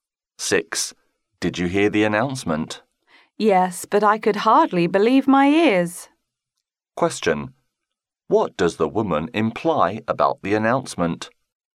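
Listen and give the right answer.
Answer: It was surprising/hard to believe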